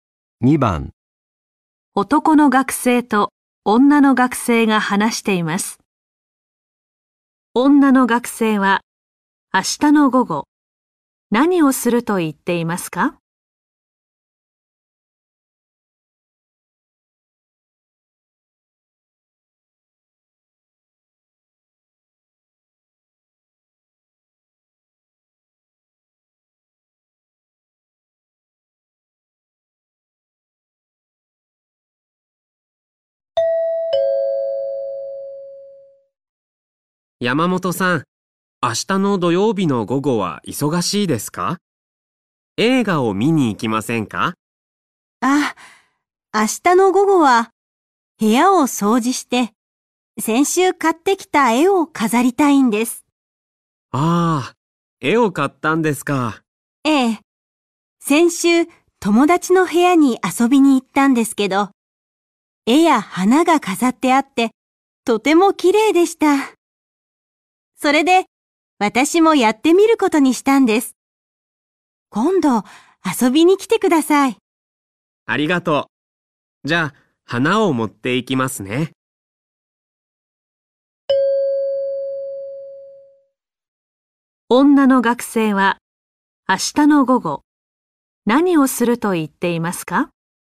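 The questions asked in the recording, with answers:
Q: 女の学生は明日の午後、何をすると言っていますか?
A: 部屋を掃除して絵を飾る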